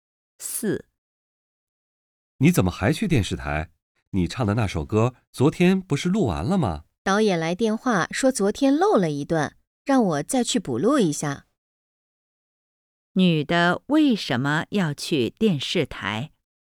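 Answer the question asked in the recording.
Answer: 昨天录歌漏了一段,要去补录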